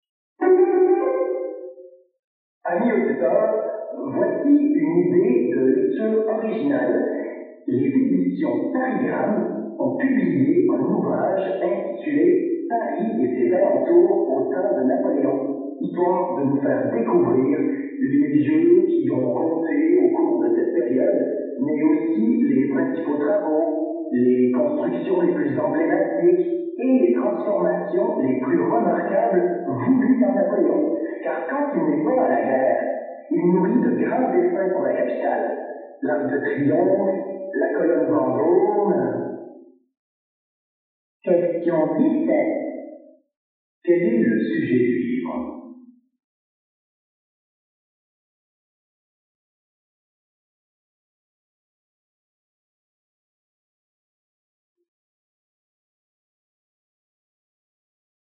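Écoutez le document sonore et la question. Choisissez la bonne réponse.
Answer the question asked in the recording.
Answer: Les transformations de Paris et ses alentours au temps de Napoléon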